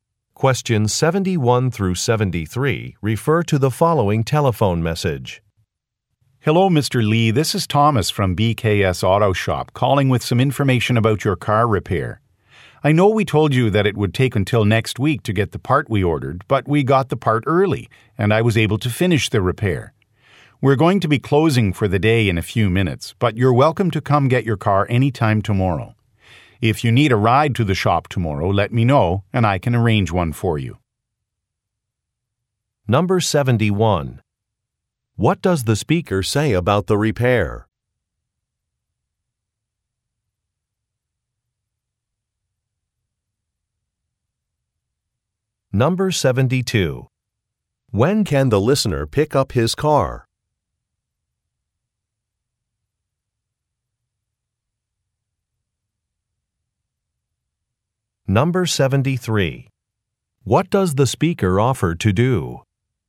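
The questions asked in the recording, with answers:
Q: What does the speaker say about the repair?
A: It was finished early because the part arrived early.

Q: When can the listener pick up his car?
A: Anytime tomorrow

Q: What does the speaker offer to do?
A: Arrange a ride to the shop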